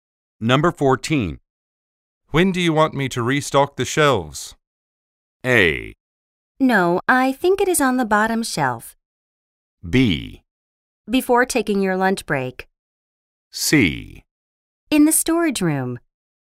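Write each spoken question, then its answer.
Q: When do you want me to restock the shelves?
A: B: Before taking your lunch break.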